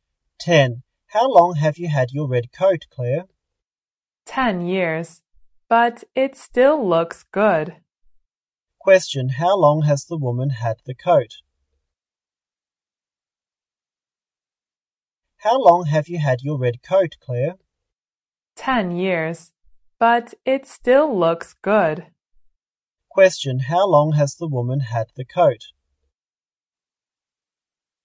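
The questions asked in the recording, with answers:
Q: How long has the woman had the coat?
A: For 10 years.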